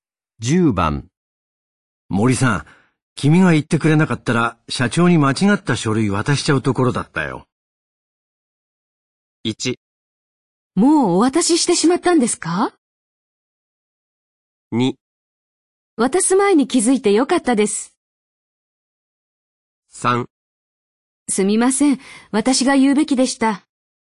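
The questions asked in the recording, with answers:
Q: 森さん、君が言ってくれなかったら社長に間違った書類渡しちゃうところだったよ。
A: 2: 渡す前に気づいてよかったです。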